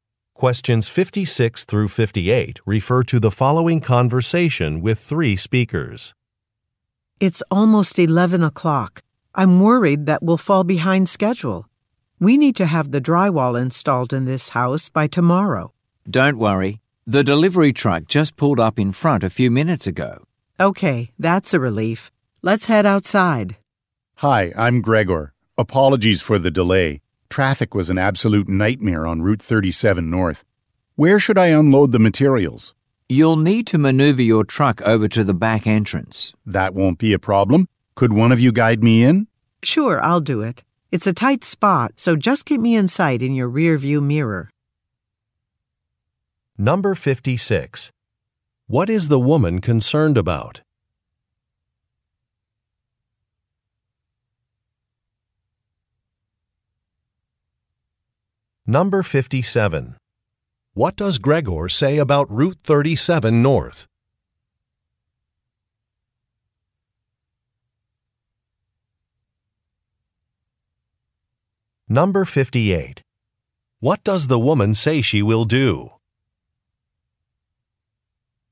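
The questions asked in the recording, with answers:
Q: What is the woman concerned about?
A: Falling behind schedule

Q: What does Gregor say about Route 37 North?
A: Traffic was bad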